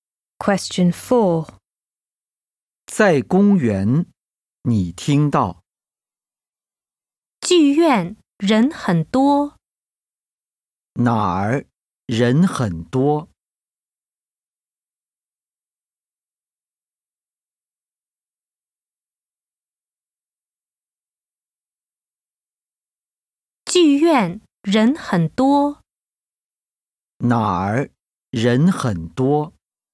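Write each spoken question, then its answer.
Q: 哪儿人很多?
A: 剧院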